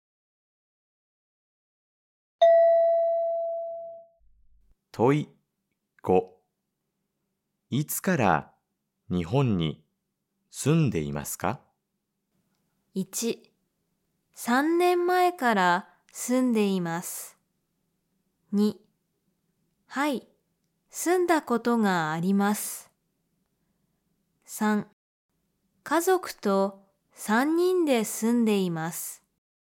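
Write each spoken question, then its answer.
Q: いつから日本に住んでいますか?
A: 1: 3年前から住んでいます。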